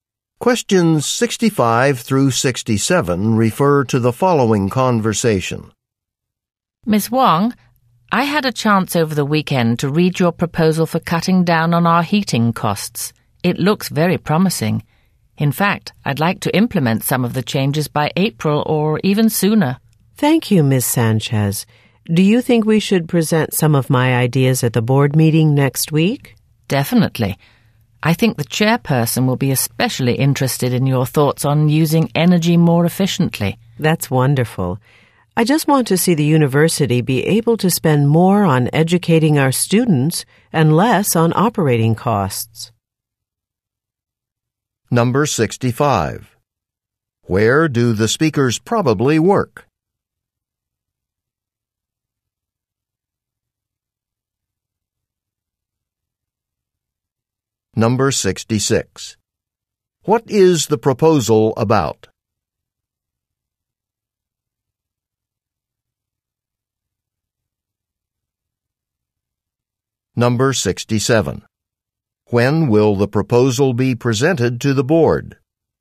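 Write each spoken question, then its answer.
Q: Where do the speakers probably work?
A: At a university

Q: What is the proposal about?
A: Cutting heating costs

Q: When will the proposal be presented to the board?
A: Next week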